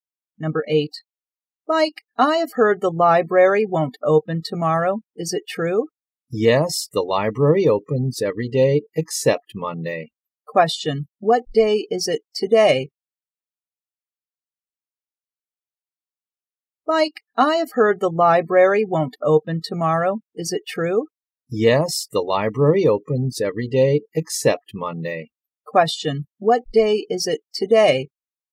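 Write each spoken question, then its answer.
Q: Question, what day is it today?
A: Sunday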